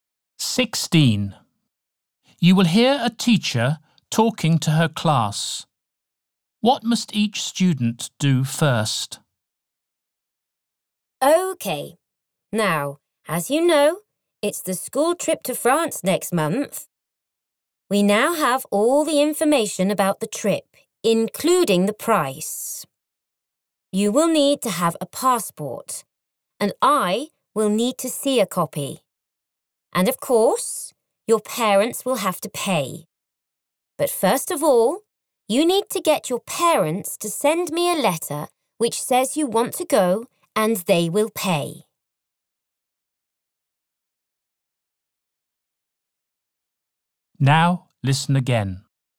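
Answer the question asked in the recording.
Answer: Get their parents to send the teacher a letter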